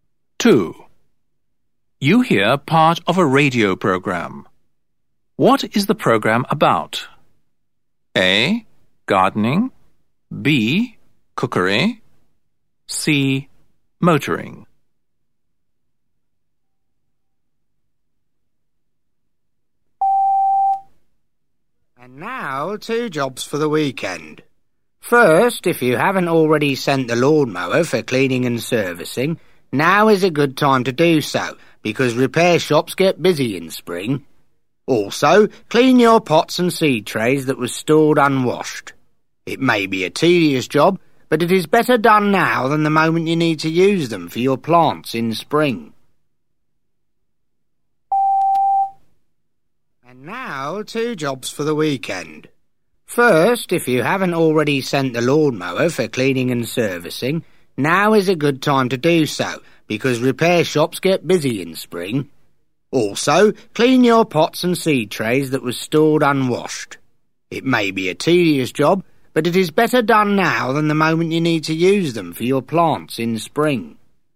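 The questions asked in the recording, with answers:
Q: What is the program about?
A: A: Gardening.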